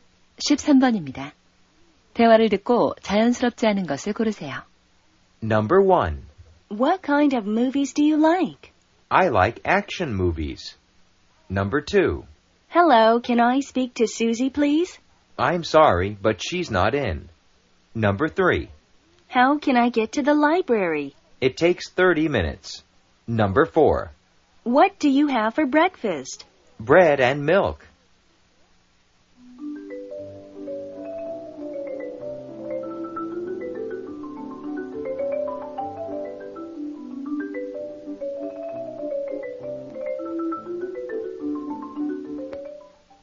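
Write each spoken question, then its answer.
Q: 대화를 듣고 자연스럽지 않은 것을 고르세요.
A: 3: How can I get to the library? / It takes 30 minutes.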